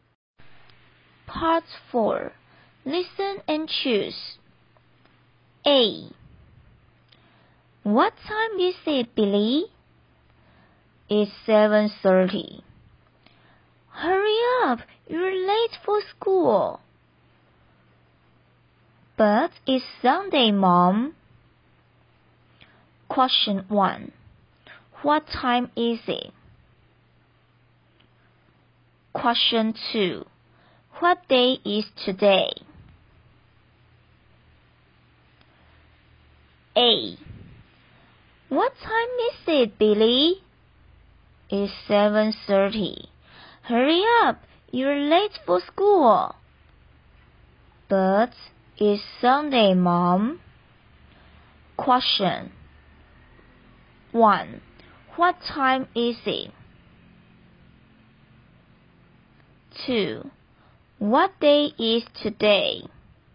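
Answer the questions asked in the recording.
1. It's 7:30.
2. It's Sunday.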